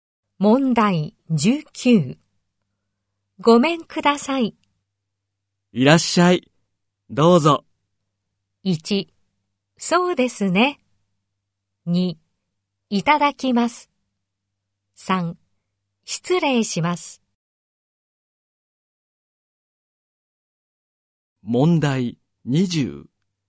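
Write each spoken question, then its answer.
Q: ごめんください。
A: 3: 失礼します。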